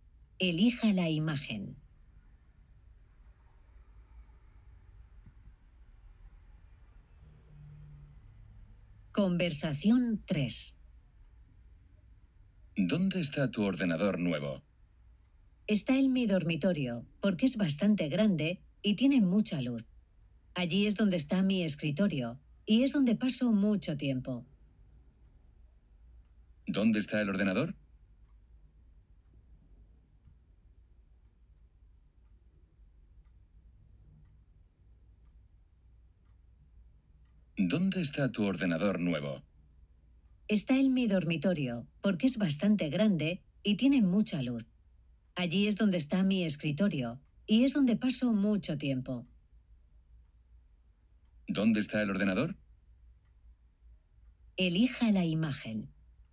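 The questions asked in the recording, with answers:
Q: ¿Dónde está el ordenador?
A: En el dormitorio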